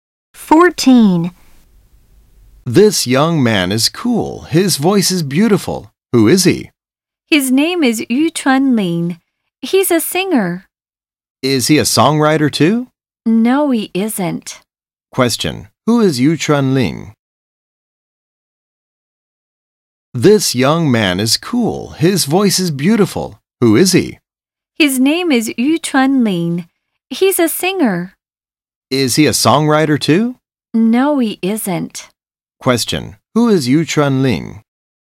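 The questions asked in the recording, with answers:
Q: Who is Yu Chunlin?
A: He's a singer.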